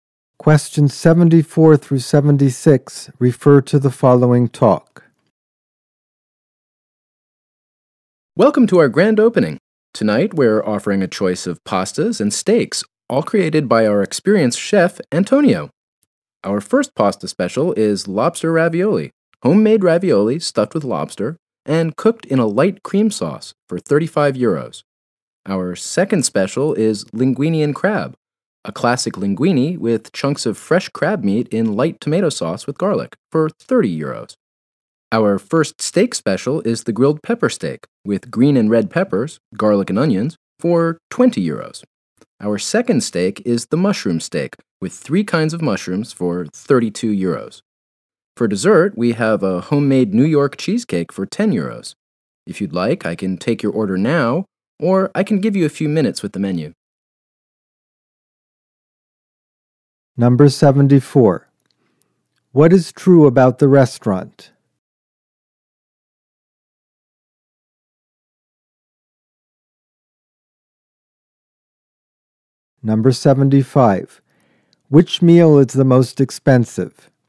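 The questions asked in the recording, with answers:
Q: Which meal is the most expensive?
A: The lobster ravioli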